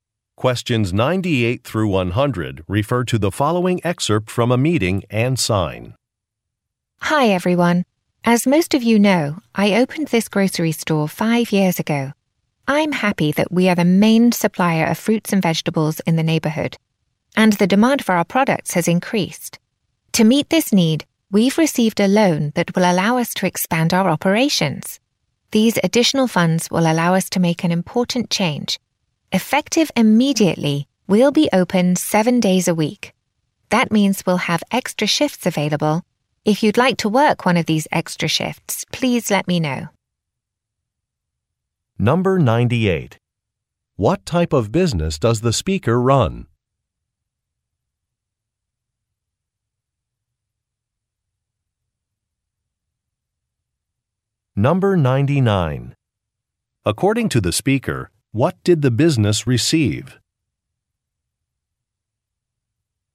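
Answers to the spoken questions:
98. A grocery store
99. A loan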